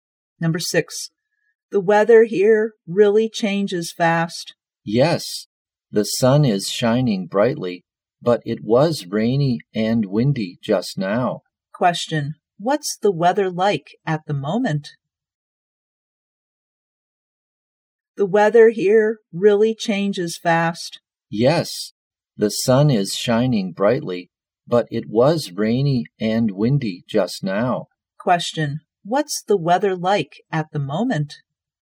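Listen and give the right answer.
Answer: Sunny.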